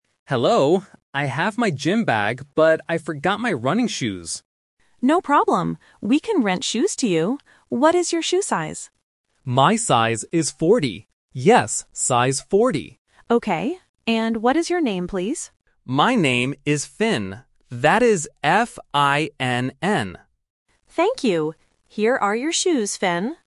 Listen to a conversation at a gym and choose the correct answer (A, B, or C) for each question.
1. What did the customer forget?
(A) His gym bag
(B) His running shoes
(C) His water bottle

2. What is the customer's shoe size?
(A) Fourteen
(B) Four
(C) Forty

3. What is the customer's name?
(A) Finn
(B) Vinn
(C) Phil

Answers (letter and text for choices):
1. (B) His running shoes
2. (C) Forty
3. (A) Finn

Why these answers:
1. The customer explicitly states, "I forgot my running shoes." Option (A) "His gym bag" is a trap; it is mentioned in the audio, but it is what he has with him, not what he forgot. Option (C) "His water bottle" is a plausible gym item but is not mentioned at all.
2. The customer clearly says and repeats, "My size is forty. Yes, size forty." Option (A) "Fourteen" is a classic phonetic trap, as "fourteen" and "forty" sound very similar to beginners. Option (B) "Four" is another phonetic distractor related to the number four.
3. The customer spells his name out loud: "That is F-I-N-N." Option (B) "Vinn" is a distractor because the letter "V" sounds similar to "F", testing the listener's phonetic recognition. Option (C) "Phil" is a plausible name but is never mentioned.